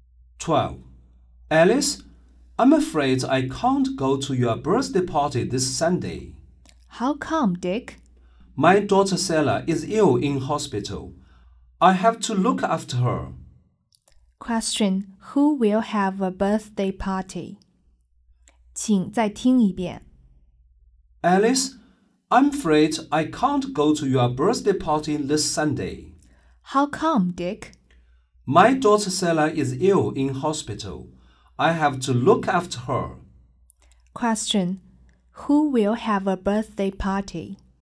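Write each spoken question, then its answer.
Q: Question: Who will have a birthday party?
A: Alice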